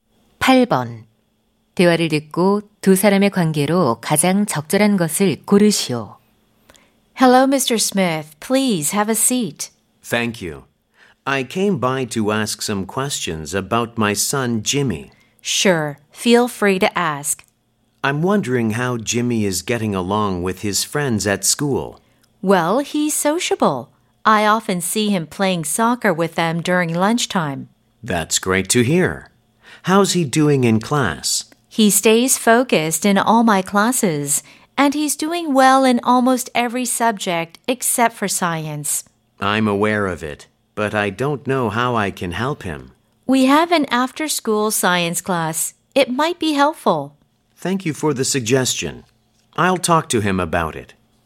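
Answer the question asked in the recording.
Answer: 교사 - 학부모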